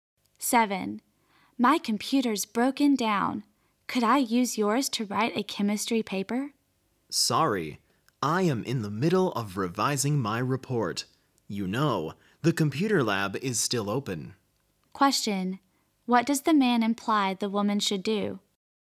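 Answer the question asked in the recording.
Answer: Use a computer in the computer lab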